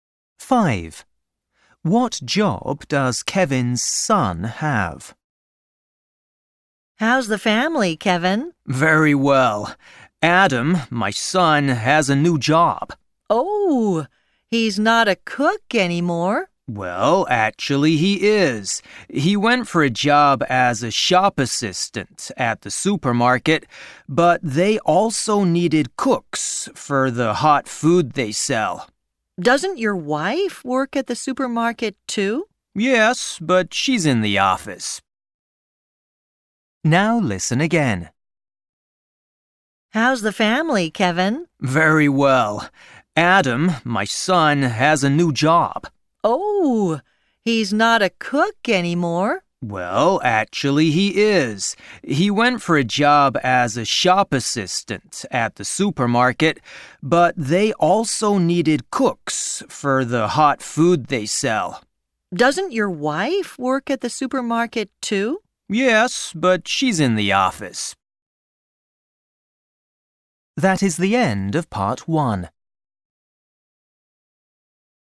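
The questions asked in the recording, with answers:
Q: What job does Kevin's son have?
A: cook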